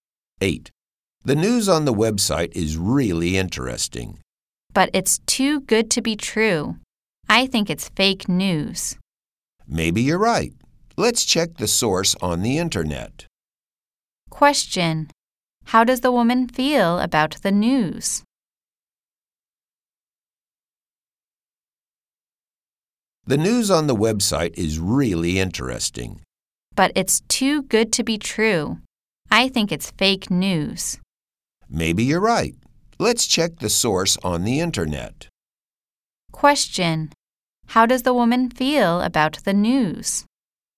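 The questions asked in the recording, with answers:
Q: How does the woman feel about the news?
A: It's too good to be true; she thinks it's fake news.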